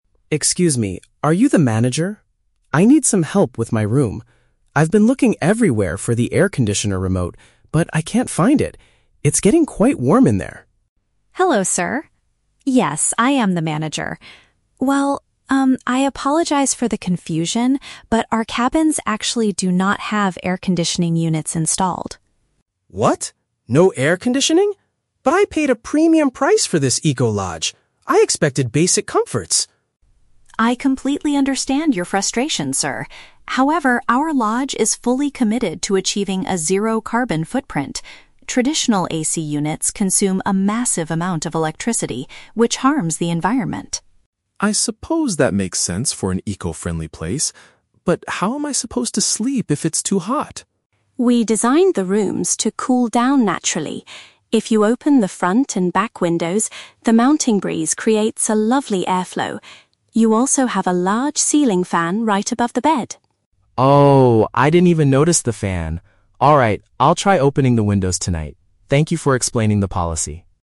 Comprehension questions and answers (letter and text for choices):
Listen to a conversation between a hotel guest and a manager. Choose the correct answer (A, B, or C) for each question.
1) Why is the guest talking to the manager at the beginning?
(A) He wants a refund for the premium price he paid.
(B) He cannot find the equipment to cool his room.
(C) He does not know how to turn on the ceiling fan.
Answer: (B) He cannot find the equipment to cool his room.

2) What is the main reason the lodge does not use air conditioners?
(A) To eliminate harmful emissions and protect nature.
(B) Because installing them would cost the lodge too much money.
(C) Because the mountain weather is always naturally freezing.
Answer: (A) To eliminate harmful emissions and protect nature.

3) How does the manager suggest the guest cool his room?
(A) By closing all the windows to keep the hot air outside.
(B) By requesting a portable cooling device from the reception.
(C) By using the outside wind and the fan above his bed.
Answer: (C) By using the outside wind and the fan above his bed.

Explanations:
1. Mr. Thomas complains that he has been "looking everywhere for the air conditioner remote" because it is "getting quite warm". "Air conditioner remote" is paraphrased as "equipment to cool his room". Why traps are wrong: Option A is a Trap. He mentions he paid a "premium price," but he doesn't ask for a refund; he just expects basic comforts. Option C is a Trap. He didn't even notice the ceiling fan until the end, so he wasn't asking how to use it.
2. Ms. Green explains the lodge is committed to "achieving a zero carbon footprint" and that AC units "harm the environment". This is paraphrased as "eliminate harmful emissions and protect nature". Why traps are wrong: Option B is a plausible reason for a business, but the manager only mentions environmental reasons, not money. Option C is a Trap. She mentions the "mountain breeze," but she does not say the weather is "always freezing" (in fact, the guest feels hot).
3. The manager advises him to open the windows for the "mountain breeze" and use the "large ceiling fan right above the bed." "Mountain breeze" is paraphrased as "outside wind". Why traps are wrong: Option A is the Trap. It is the exact opposite of what she says; she tells him to open the windows, not close them. Option B is plausible in a standard hotel, but the manager does not offer any portable cooling devices.

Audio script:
Thomas: Excuse me, are you the manager? I need some help with my room. I've been looking everywhere for the air conditioner remote, but I can't find it. It's getting quite warm in there.
Green: Hello, sir. Yes, I am the manager. Well, um, I apologize for the confusion, but our cabins actually do not have air conditioning units installed.
Thomas: What? No air conditioning? But I paid a premium price for this eco-lodge. I expected basic comforts!
Green: I completely understand your frustration, sir. However, our lodge is fully committed to achieving a zero carbon footprint. Traditional AC units consume a massive amount of electricity, which harms the environment.
Thomas: I suppose that makes sense for an eco-friendly place. But how am I supposed to sleep if it's too hot?
Green: We designed the rooms to cool down naturally. If you open the front and back windows, the mountain breeze creates a lovely airflow. You also have a large ceiling fan right above the bed.
Thomas: Oh, I didn't even notice the fan. Alright, I'll try opening the windows tonight. Thank you for explaining the policy.